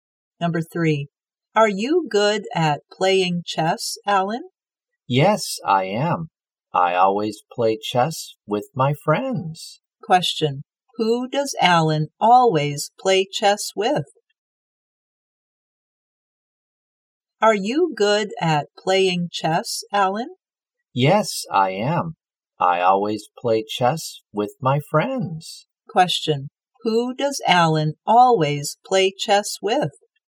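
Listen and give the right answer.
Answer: His friends.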